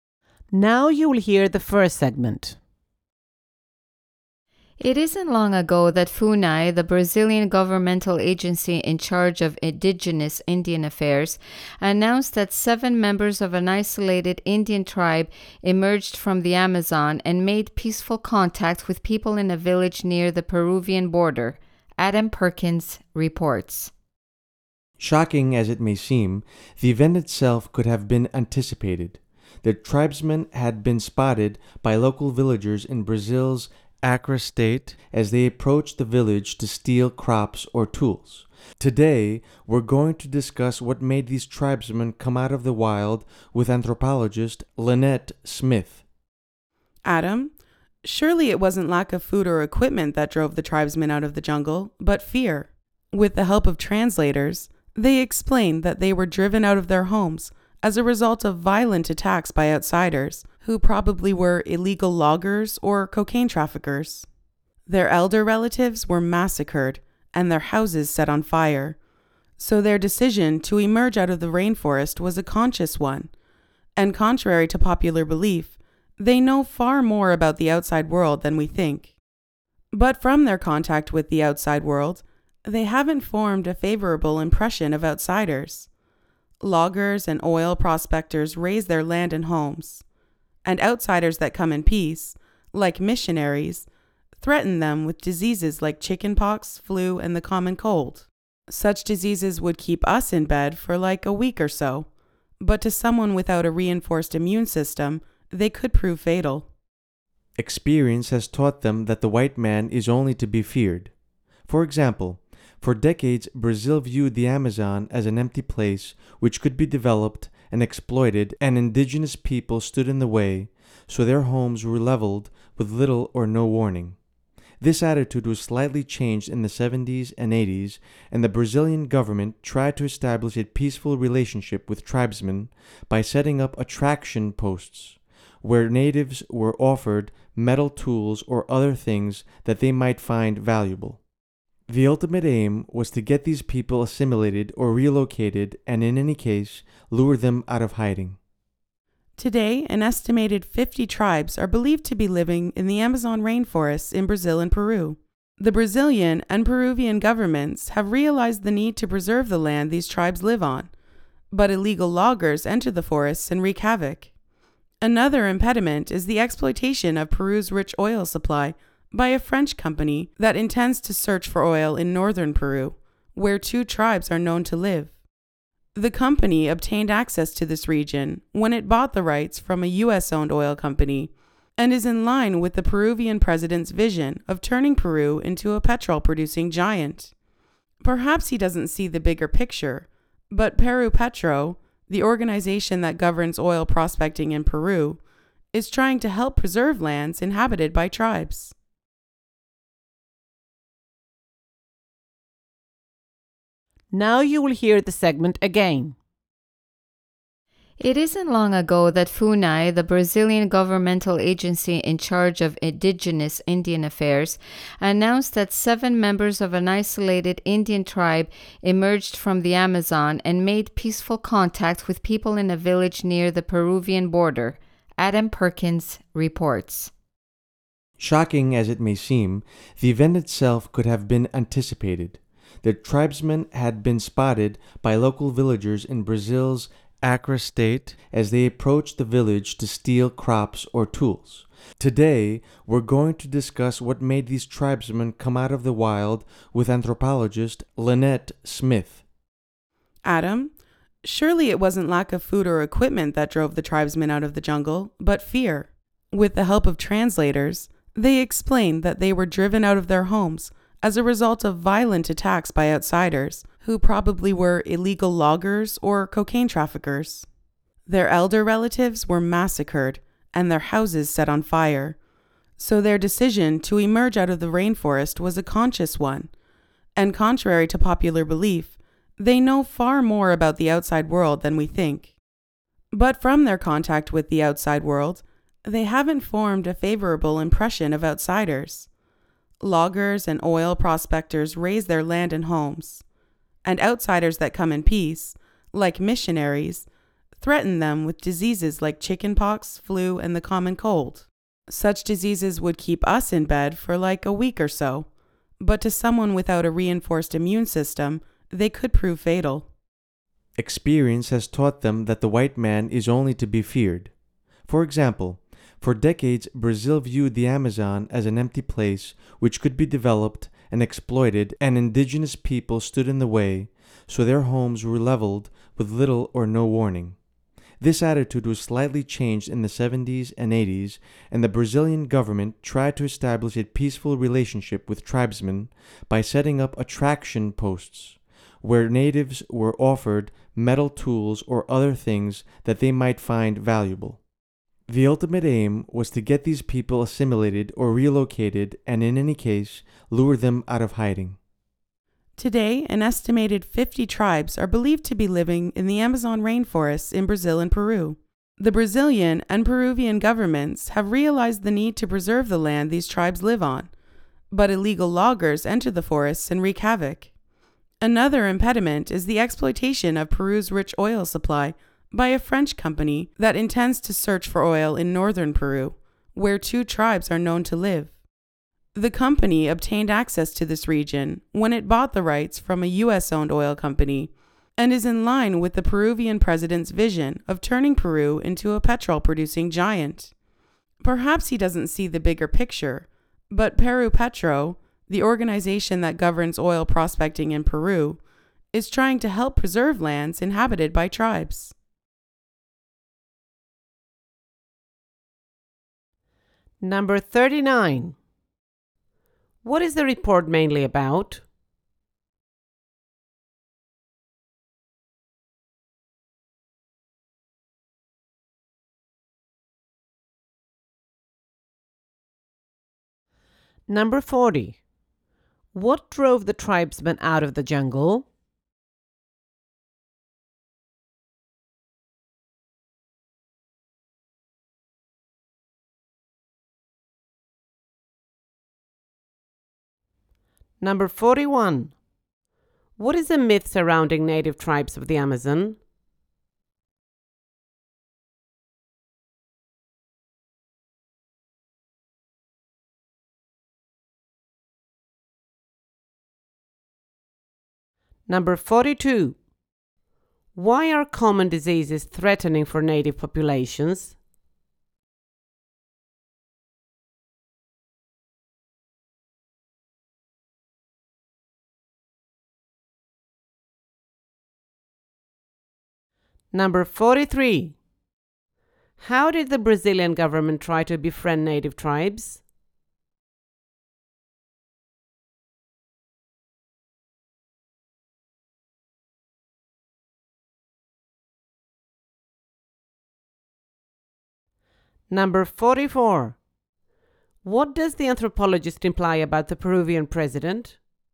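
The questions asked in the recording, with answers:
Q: What drove the tribesmen out of the jungle?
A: Fear caused by violent attacks from outsiders

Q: What is a myth surrounding native tribes of the Amazon?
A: That they know little about the outside world

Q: Why are common diseases threatening for native populations?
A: They don't have a reinforced immune system, so the diseases can be fatal

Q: How did the Brazilian government try to befriend native tribes?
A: By setting up attraction posts that offered metal tools and other valuable things

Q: What does the anthropologist imply about the Peruvian president?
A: He doesn't see the bigger picture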